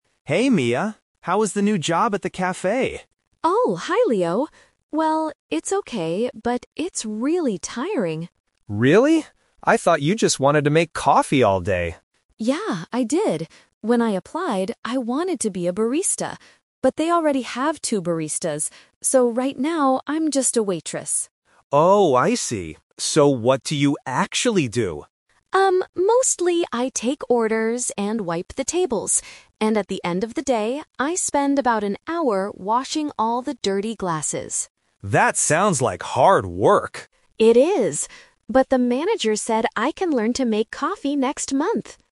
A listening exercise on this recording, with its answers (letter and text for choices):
Listen to the conversation between two friends and choose the correct answer (A, B, or C) for each question.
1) What did Mia want to do when she applied for the job?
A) Take orders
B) Make coffee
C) Wash glasses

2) What is Mia's job at the cafe right now?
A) Barista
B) Manager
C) Waitress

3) What does Mia do at the end of the day?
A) She washes the glasses.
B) She wipes the tables.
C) She learns to make coffee.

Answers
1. B) Make coffee
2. C) Waitress
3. A) She washes the glasses.

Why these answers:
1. Leo asks if she wanted to make coffee, and Mia says "Yeah, I did! When I applied, I wanted to be a barista." Options (A) and (C) are things she actually does now, not what she wanted to do at first.
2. Mia says "...right now, I'm just a waitress." Option (A) is the trap: she wanted to be a barista, but they already have two. Option (B) is a trap: the manager is mentioned at the end, but Mia is not the manager.
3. Mia explicitly states: "And at the end of the day, I spend about an hour washing all the dirty glasses." Option (B) is a trap: she wipes the tables during the day, not specifically at the end. Option (C) is a trap: she will learn to make coffee "next month", not at the end of the day.

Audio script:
Leo: Hey Mia! How is the new job at the cafe?
Mia: Oh, hi Leo. Well, it's okay, but it's really tiring.
Leo: Really? I thought you just wanted to make coffee all day.
Mia: Yeah, I did! When I applied, I wanted to be a barista. But they already have two baristas. So right now, I'm just a waitress.
Leo: Oh, I see. So what do you actually do?
Mia: Um, mostly I take orders and wipe the tables. And at the end of the day, I spend about an hour washing all the dirty glasses.
Leo: That sounds like hard work.
Mia: It is. But the manager said I can learn to make coffee next month!